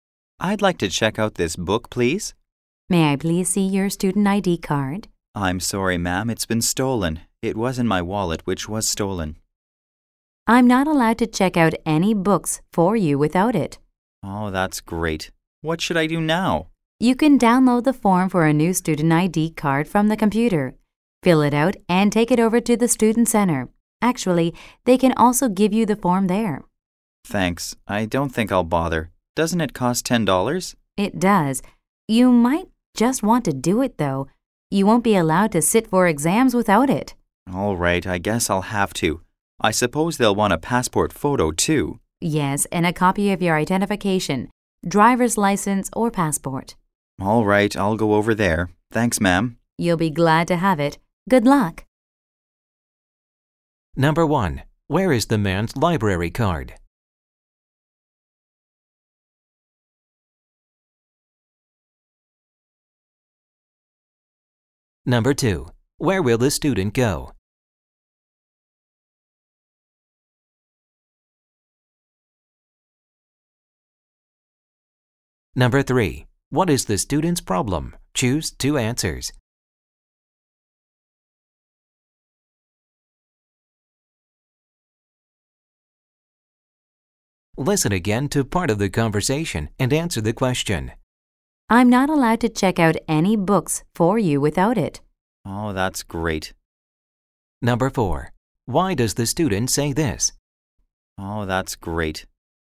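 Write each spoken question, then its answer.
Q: Where is the man's library card?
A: It was stolen along with his wallet

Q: Where will the student go?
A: To the student center

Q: Why does the student say this?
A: He is being sarcastic; he is frustrated that he can't check out the book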